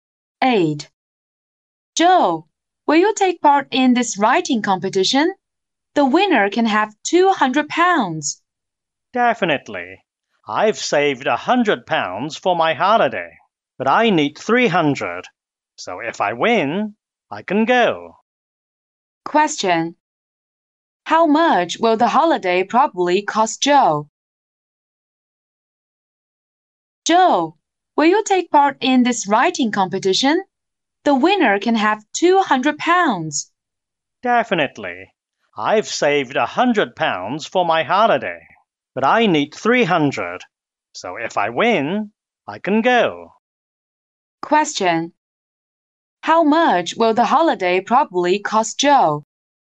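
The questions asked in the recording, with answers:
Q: How much will the holiday probably cost Joe?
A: £300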